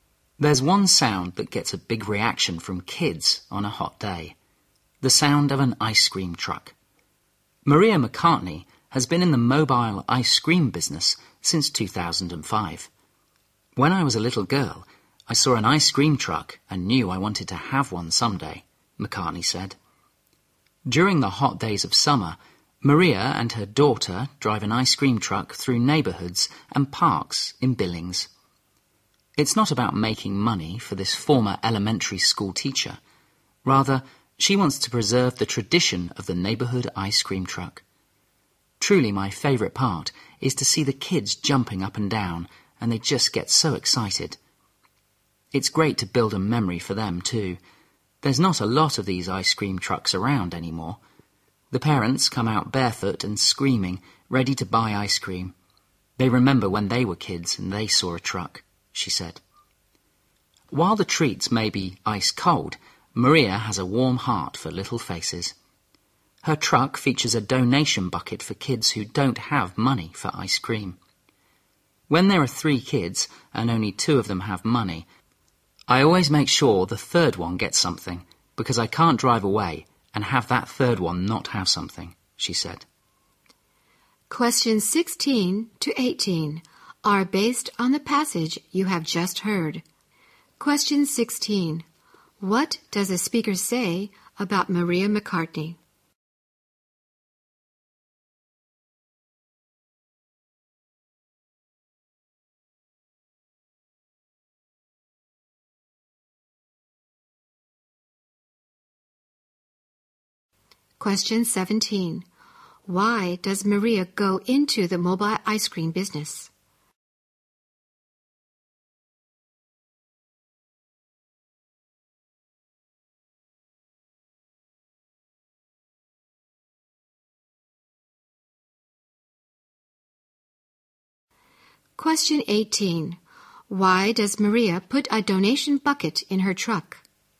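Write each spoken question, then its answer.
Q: What does a speaker say about Maria McCartney?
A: She is a former elementary school teacher who has run an ice cream truck since 2005

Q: Why does Maria go into the mobile ice cream business?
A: To preserve the tradition of the neighborhood ice cream truck

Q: Why does Maria put a donation bucket in her truck?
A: So kids without money can still get ice cream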